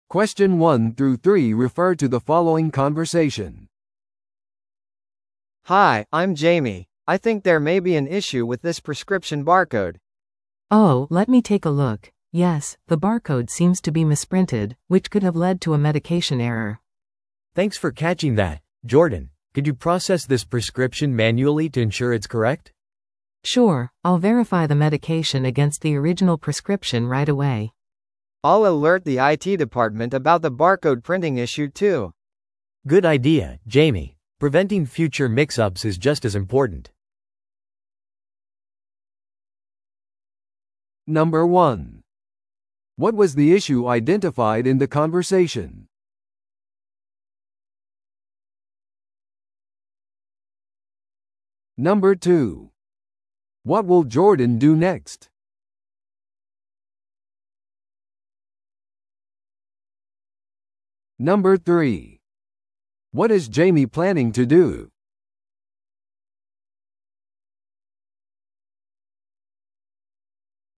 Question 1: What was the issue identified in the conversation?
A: 処方箋のバーコードが誤って印刷されていた。

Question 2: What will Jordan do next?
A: 薬品を手動で確認する。

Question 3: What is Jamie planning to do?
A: 印刷の問題についてIT部門に情報を提供する。

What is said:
A: Hi, I'm Jamie. I think there may be an issue with this prescription barcode.
B: Oh, let me take a look. Yes, the barcode seems to be misprinted, which could have led to a medication error.
C: Thanks for catching that, Jordan. Could you process this prescription manually to ensure it's correct?
B: Sure, I'll verify the medication against the original prescription right away.
A: I'll alert the IT department about the barcode printing issue too.
C: Good idea, Jamie. Preventing future mix-ups is just as important.